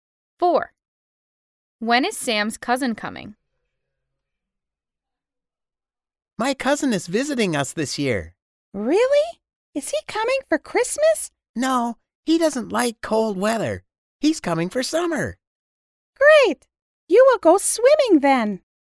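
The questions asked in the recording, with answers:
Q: When is Sam's cousin coming?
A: in summer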